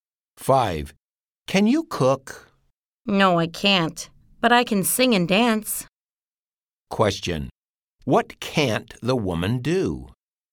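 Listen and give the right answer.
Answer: Cook.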